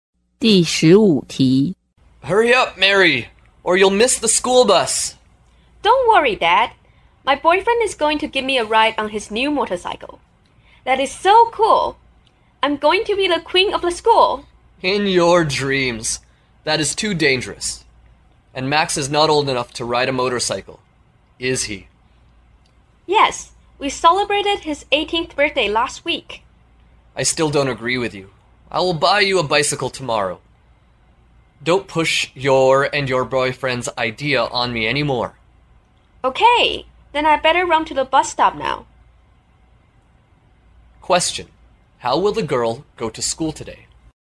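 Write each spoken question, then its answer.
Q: How will the girl go to school today?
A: By school bus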